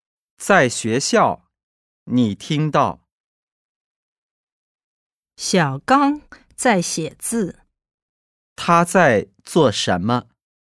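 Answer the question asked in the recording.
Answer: 写字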